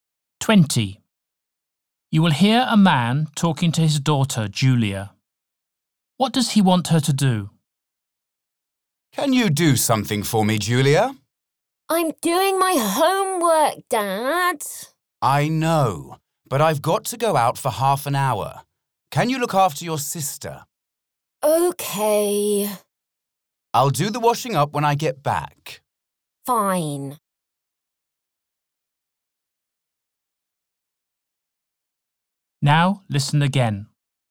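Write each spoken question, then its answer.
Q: What does he want her to do?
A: Look after her sister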